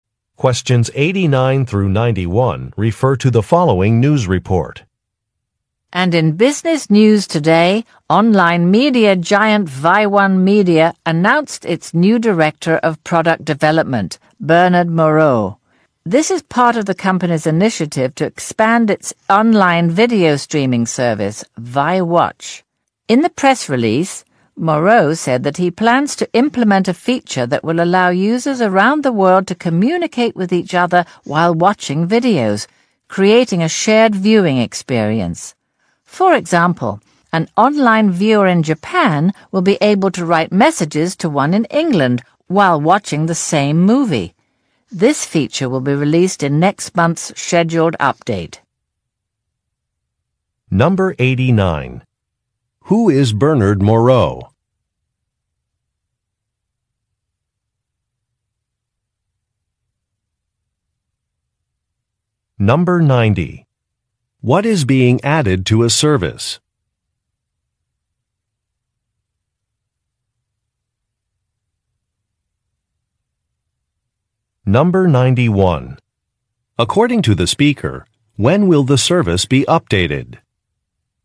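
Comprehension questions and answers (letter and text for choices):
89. Who is Bernard Moreau?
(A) A news reporter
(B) A corporate executive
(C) A film director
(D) An actor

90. What is being added to a service?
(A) An online store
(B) Automatic billing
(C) A rating system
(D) A communication feature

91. According to the speaker, when will the service be updated?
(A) Tomorrow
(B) Next week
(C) Next month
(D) Next year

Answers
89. (B) A corporate executive
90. (D) A communication feature
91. (C) Next month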